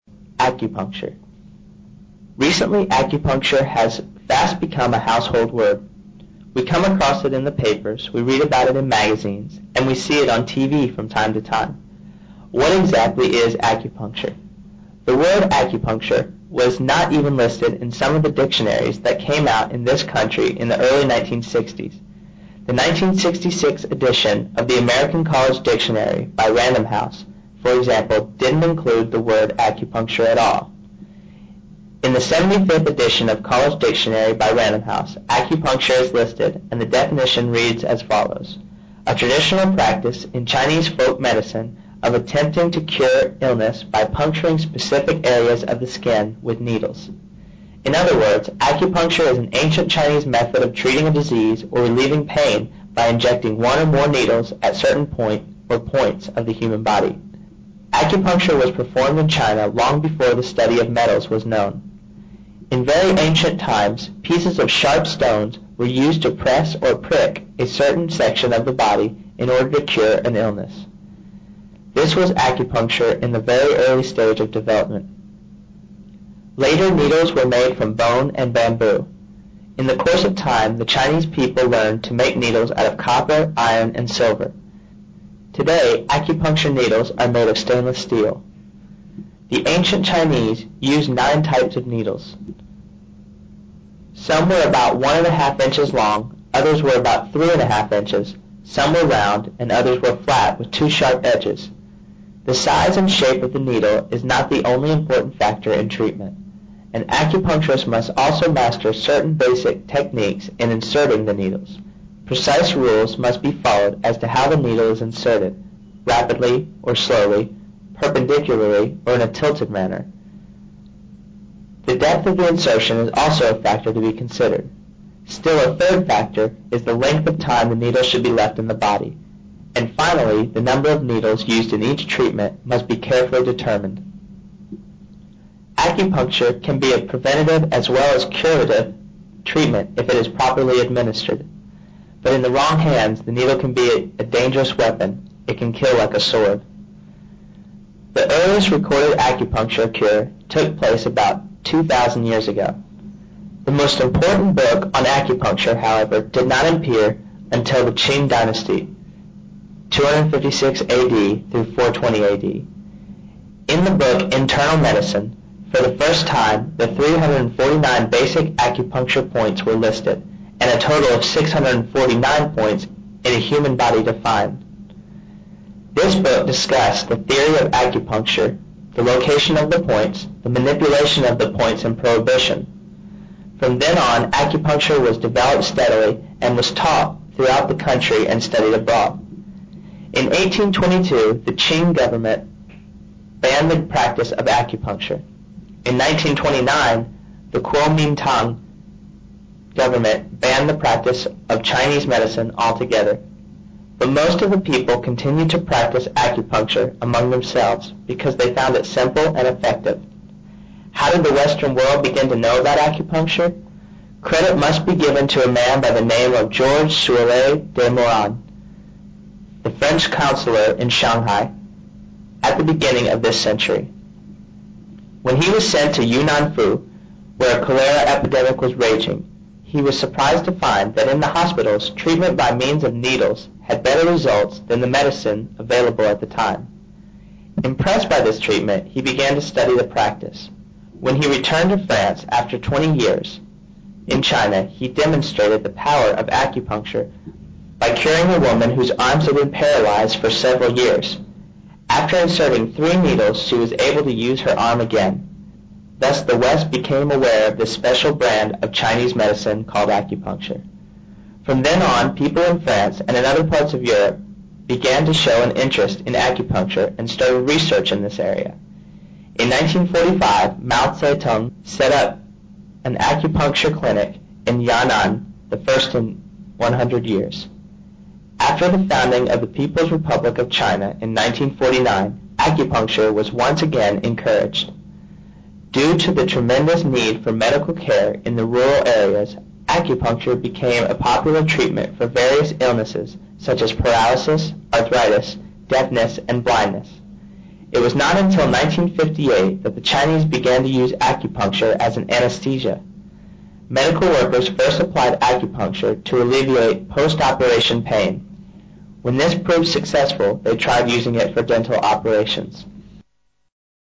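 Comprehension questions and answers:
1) Recently, acupuncture has become a 1 ______word in America.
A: household

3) Acupuncture was performed in China long before the study of 3 ______.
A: metals

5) Later, needles were made from 5 ______and bamboo.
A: bone

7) Today, the needles are made of 7 ______.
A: stainless steel

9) The size and 9 ______of the needles.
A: shape

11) The 11 ______of the time the needle should be left in the body.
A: length

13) The earliest recorded acupuncture cure took place about 13 ______years ago.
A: 2,000

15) In the book, 15 ______basic points in human body were listed,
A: 349

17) A French 17 ______introduced it to the west at the beginning of this century.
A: counselor

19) The first acupuncture clinicwas set up in 19 ______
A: Yan'an

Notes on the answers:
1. Acupuncture Recently acupuncture has fast become a household word. We come across it in the papers; we read about it in magazines and we see it on TV from time to time. 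What exactly is acupuncture? The word "acupuncture" was not even listed in some of the dictionaries that came out in this country in the early 1960's. The 1966 edition of the American College Dictionary by Random House, for example, didn't include the word i° acupuncture" at all. In the 75 edition of College Dictionary by Random House, "acupuncture" is listed, and the definition reads as follows: A traditional practice in Chinese folk medicine of attempting ot cure illness by puncturing specified areas of the skin with needles. In other words, acupuncture is an ancient Chinese method of treating a disease or relieving pain by injecting one or more needles at certain point or points of the human body. Acupuncture was performed in China long before the study of metals was known. In very ancient times pieces of sharp stones were used to press or prick a certain section of the body in order to cure an illness. 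This was acupuncture in the very early stage of development. Later, needles were made from bone and bamboo. In the cou

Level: 专业八级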